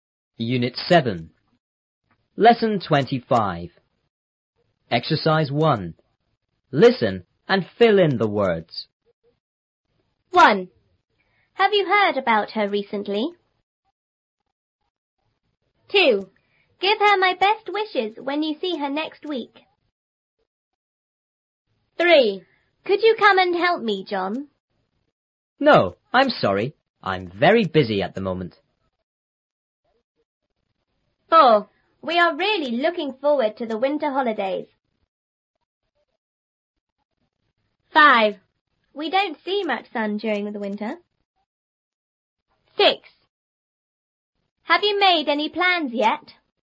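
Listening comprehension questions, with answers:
1.Listen and fill in the words.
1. Have you___about her___?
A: heard; recently

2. Give her my best___when you see her___week.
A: wishes; next

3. A:___you come and help me,John?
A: Could

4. B:No,I'm sorry.I'm very busy at the___.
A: moment

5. We are___looking forward to the winter___.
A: really; holidays

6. We don't see___sun___ the winter.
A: much; during

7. Have you___any___yet?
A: made; plans

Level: 初中英语广州版3B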